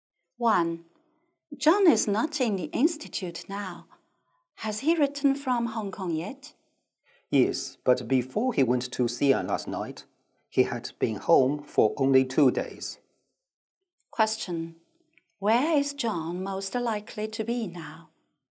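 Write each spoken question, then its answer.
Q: Where is John most likely to be now?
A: In Xi'an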